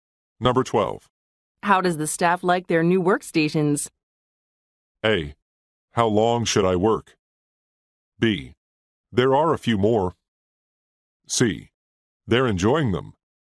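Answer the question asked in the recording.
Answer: C: They're enjoying them.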